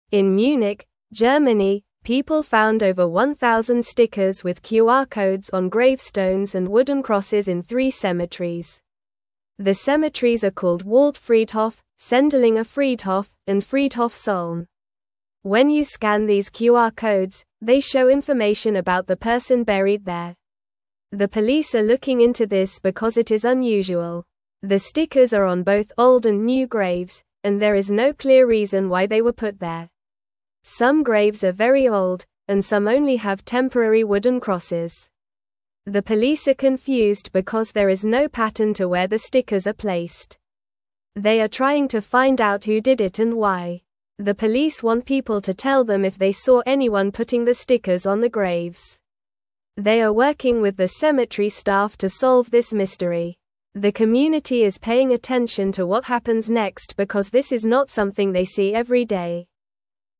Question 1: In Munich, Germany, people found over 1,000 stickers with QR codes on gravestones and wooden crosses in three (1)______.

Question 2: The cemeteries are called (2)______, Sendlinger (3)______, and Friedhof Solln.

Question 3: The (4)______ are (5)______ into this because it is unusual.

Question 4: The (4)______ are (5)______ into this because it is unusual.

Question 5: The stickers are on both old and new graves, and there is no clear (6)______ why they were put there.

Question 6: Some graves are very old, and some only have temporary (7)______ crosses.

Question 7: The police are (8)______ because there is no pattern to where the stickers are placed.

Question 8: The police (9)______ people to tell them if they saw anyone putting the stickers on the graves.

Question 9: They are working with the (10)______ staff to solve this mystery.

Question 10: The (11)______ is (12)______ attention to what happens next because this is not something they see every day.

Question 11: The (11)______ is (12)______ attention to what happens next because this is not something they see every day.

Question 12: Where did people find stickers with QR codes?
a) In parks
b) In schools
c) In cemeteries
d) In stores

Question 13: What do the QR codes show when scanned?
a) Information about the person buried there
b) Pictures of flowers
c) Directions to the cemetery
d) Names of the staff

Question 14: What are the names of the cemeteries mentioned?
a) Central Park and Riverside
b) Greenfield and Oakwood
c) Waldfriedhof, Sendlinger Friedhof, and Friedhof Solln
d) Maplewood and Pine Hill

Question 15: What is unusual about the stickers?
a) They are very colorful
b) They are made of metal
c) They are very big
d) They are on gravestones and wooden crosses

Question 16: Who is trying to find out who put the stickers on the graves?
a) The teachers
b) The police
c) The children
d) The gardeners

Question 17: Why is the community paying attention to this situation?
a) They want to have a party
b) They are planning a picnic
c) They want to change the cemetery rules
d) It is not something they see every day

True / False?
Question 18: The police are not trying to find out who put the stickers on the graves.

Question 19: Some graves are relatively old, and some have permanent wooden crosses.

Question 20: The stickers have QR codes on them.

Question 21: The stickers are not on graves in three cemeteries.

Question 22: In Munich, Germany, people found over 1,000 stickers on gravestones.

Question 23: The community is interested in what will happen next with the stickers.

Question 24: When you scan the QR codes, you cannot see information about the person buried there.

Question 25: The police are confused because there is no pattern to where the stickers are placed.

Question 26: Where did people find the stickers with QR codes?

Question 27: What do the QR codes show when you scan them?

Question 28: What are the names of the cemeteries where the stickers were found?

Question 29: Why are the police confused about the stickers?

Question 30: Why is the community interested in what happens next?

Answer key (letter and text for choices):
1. cemeteries
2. Waldfriedhof
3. police
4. looking
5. reason
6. wooden
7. confused
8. want
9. cemetery
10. community
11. paying
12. c) In cemeteries
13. a) Information about the person buried there
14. c) Waldfriedhof, Sendlinger Friedhof, and Friedhof Solln
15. d) They are on gravestones and wooden crosses
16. b) The police
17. d) It is not something they see every day
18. False
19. False
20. True
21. False
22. True
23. True
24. False
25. True
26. People found the stickers in three cemeteries in Munich, Germany.
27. The QR codes show information about the person who is buried there.
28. Waldfriedhof, Sendlinger Friedhof, and Friedhof Solln
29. The police are confused because there is no clear reason or pattern for why the stickers were put on the graves.
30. The community is interested because this is an unusual event that they do not see every day.

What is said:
In Munich, Germany, people found over 1,000 stickers with QR codes on gravestones and wooden crosses in three cemeteries. The cemeteries are called Waldfriedhof, Sendlinger Friedhof, and Friedhof Solln. When you scan these QR codes, they show information about the person buried there. The police are looking into this because it is unusual.
The stickers are on both old and new graves, and there is no clear reason why they were put there. Some graves are very old, and some only have temporary wooden crosses. They are trying to find out who did it and why.
The police want people to tell them if they saw anyone putting the stickers on the graves. They are working with the cemetery staff to solve this mystery. The community is paying attention to what happens next because this is not something they see every day.

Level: Level 2